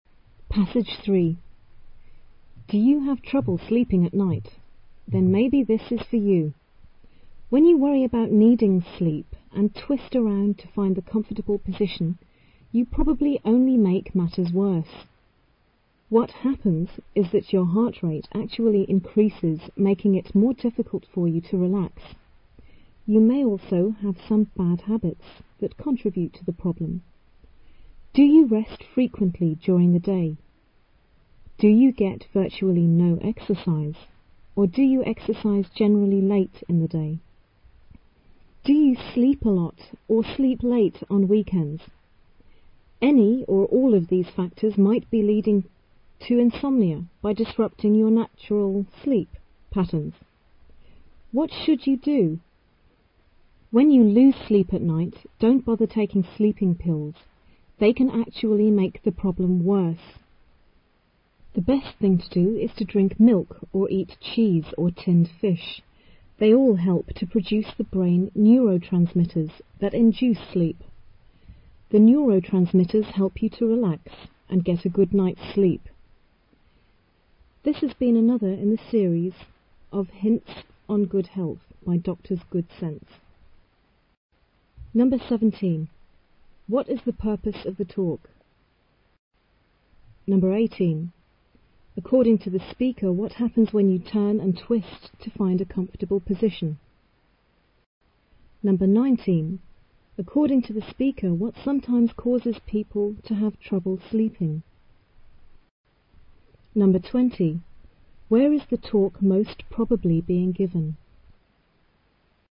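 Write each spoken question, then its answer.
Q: What is the purpose of the talk?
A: To give advice on how to sleep well

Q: According to the speaker, what happens when you turn and twist to find a comfortable position?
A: Your heart rate increases

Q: According to the speaker, what sometimes causes people to have trouble sleeping?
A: Bad habits, such as resting often during the day or getting no exercise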